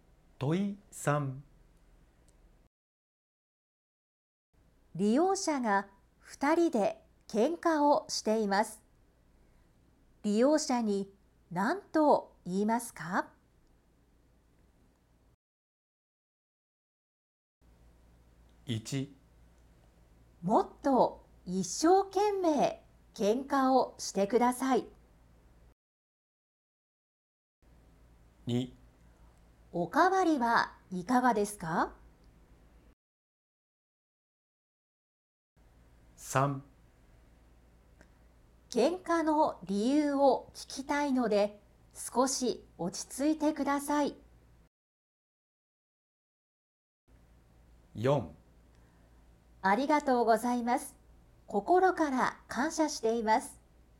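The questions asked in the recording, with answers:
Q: 利用者が二人で喧嘩をしています。利用者に何と言いますか?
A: 3: 喧嘩の理由を聞きたいので少し落ち着いてください。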